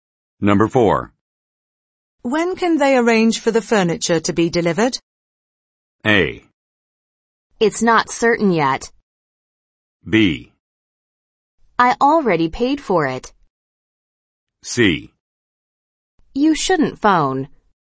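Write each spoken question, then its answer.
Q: When can they arrange for the furniture to be delivered?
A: A: It's not certain yet.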